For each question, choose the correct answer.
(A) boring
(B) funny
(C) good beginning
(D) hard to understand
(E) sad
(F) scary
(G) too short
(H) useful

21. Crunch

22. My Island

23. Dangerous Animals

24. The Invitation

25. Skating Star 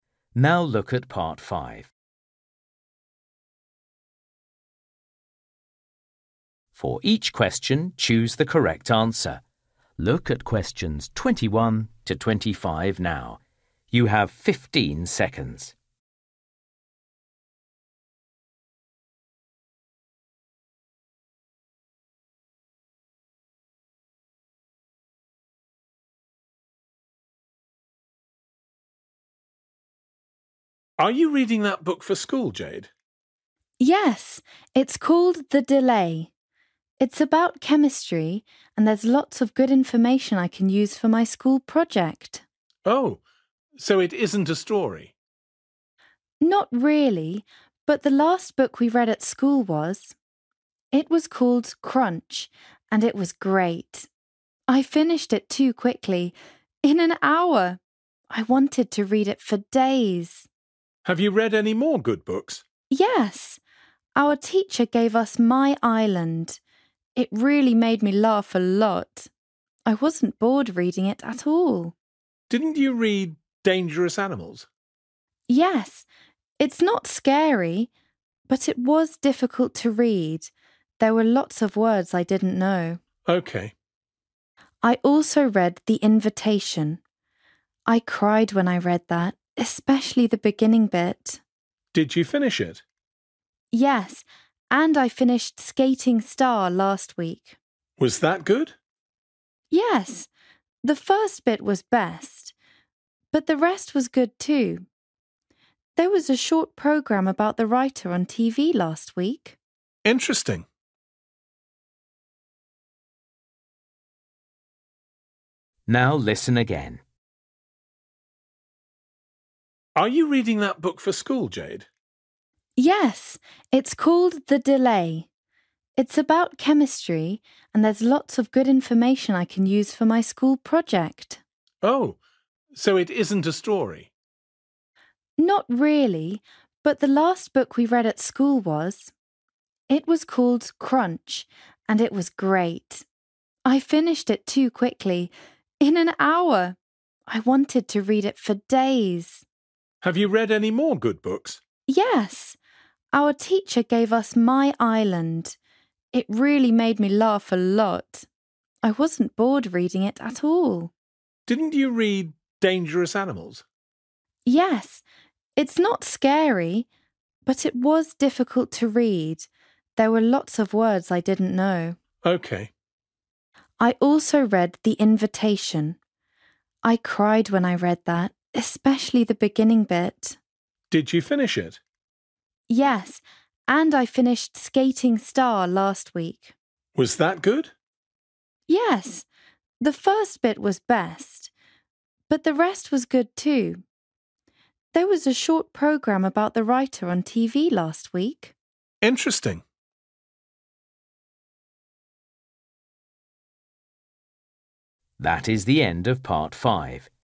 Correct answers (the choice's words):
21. too short
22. funny
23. hard to understand
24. sad
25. good beginning

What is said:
Uncle: Are you reading that book for school, Jade?
Jade: Yes, it's called The Delay. It's about chemistry and there's lots of good information I can use for my school project.
Uncle: Oh, so it isn't a story?
Jade: Not really, but the last book we read at school was. It was called Crunch and it was great. I finished it too quickly – in an hour! I wanted to read it for days!
Uncle: Have you read any more good books?
Jade: Yes, our teacher gave us My Island. It really made me laugh a lot. I wasn't bored reading it at all.
Uncle: Didn't you read Dangerous Animals?
Jade: Yes, it's not scary! But it was difficult to read – there were lots of words I didn't know.
Uncle: OK.
Jade: I also read The Invitation. I cried when I read that, especially the beginning bit.
Uncle: Did you finish it?
Jade: Yes, and I finished Skating Star last week.
Uncle: Was that good?
Jade: Yes, the first bit was best. But the rest was good, too. There was a short programme about the writer on TV last week.
Uncle: Interesting.

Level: KET (A2)